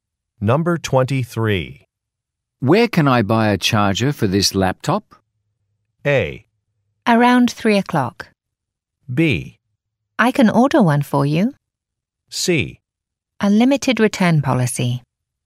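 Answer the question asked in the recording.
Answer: B: I can order one for you.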